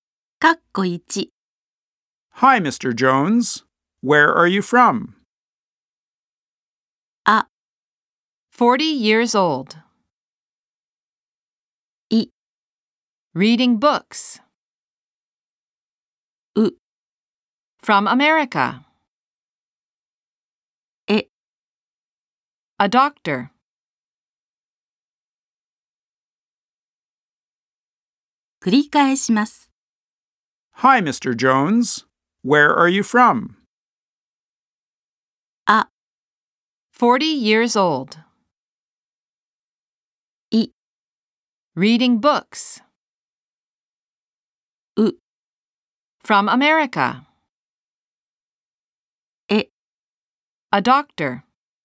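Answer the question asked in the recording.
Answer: U: From America.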